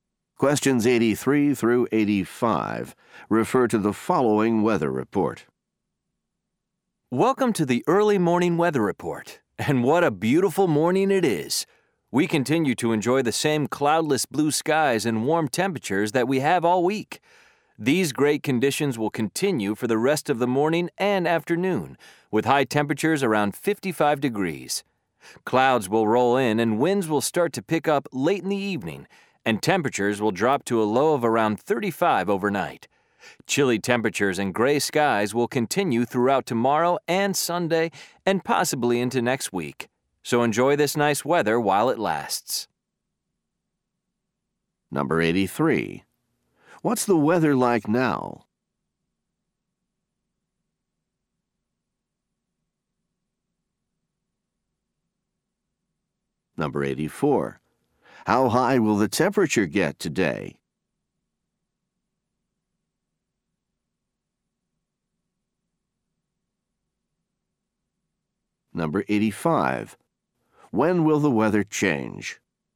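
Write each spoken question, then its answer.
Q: What's the weather like now?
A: Clear and warm

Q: How high will the temperature get today?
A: Around 55 degrees

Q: When will the weather change?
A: Late this evening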